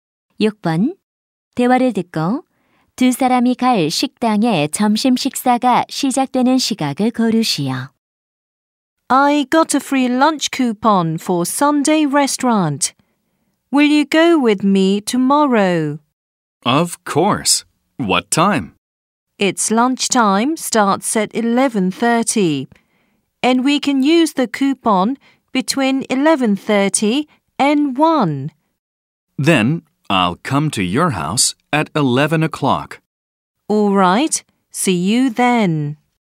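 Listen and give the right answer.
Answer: 11시 30분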